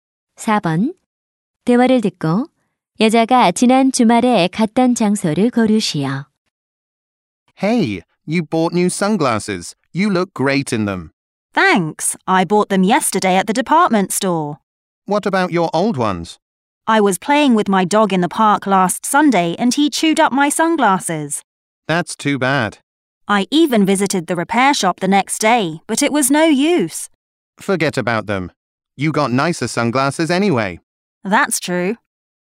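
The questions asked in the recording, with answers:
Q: 대화를 듣고 여자가 지난 주말에 갔던 장소를 고르시오.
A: 공원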